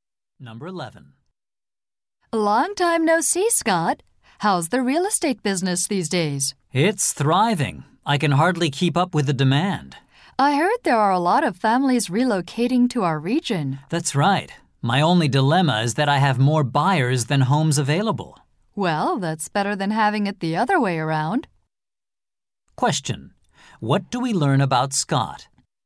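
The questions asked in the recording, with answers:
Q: What do we learn about Scott?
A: He has more buyers than homes available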